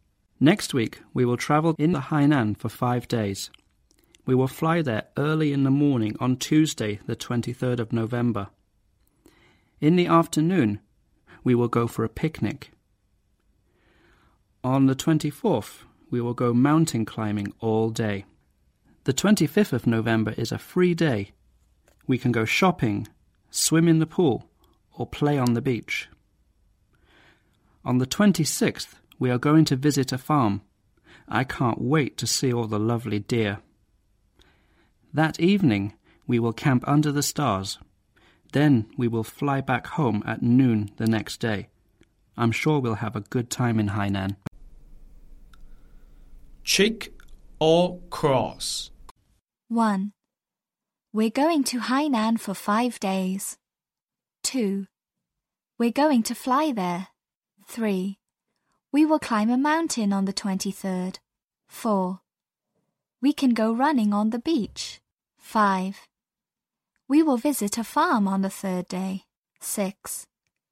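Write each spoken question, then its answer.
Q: We're going to Hainan for 5 days.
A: True (check)

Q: We're going to fly there.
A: True (check)

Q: We will climb a mountain on the 23rd.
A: False (cross): on the 24th

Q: We will visit a farm on the 3rd day.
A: False (cross): on the 4th day

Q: We're going to fly back on the evening of the 26th.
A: False (cross): at noon on the 27th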